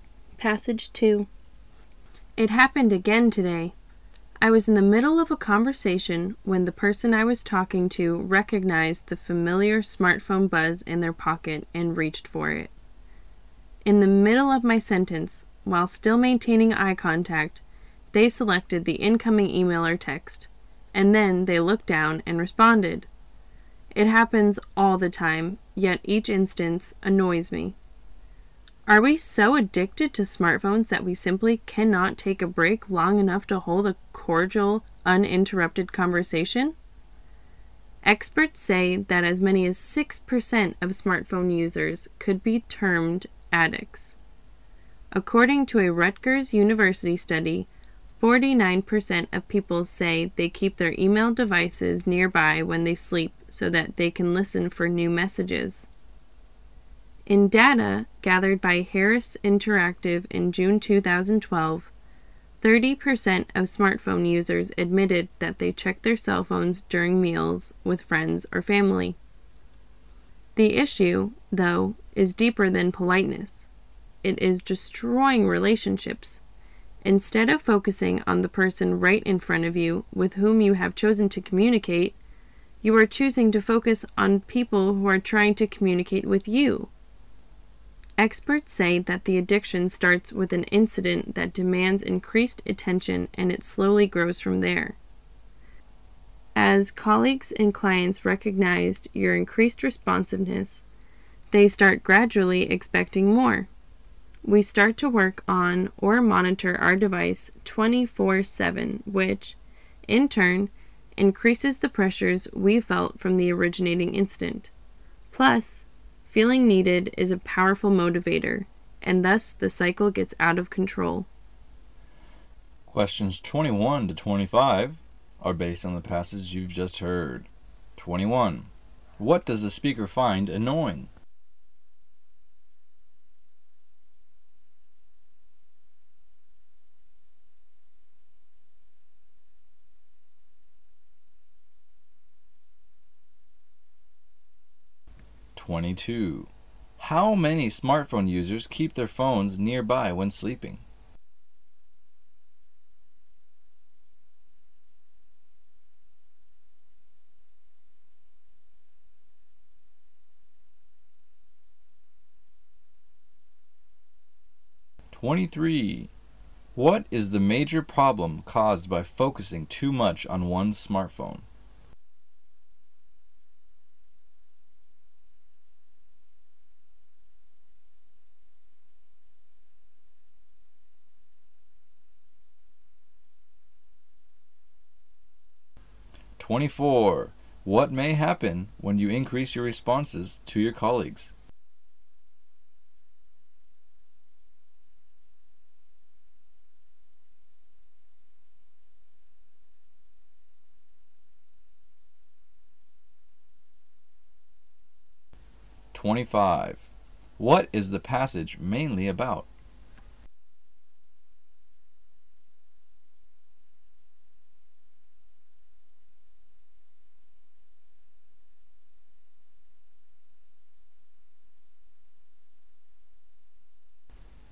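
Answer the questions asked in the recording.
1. People checking their smartphones in the middle of a conversation
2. 49%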